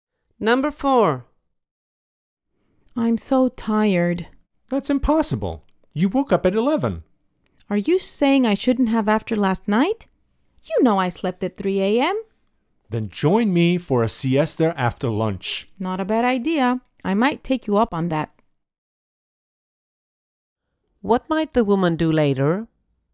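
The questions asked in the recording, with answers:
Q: What might the woman do later?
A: Take a siesta (nap) after lunch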